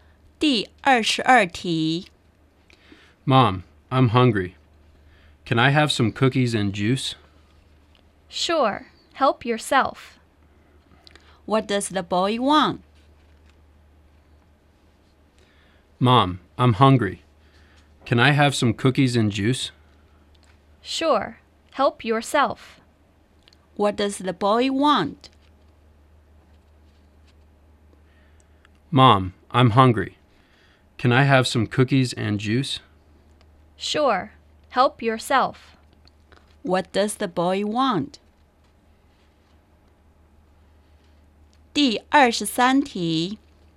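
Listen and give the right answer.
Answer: Cookies and juice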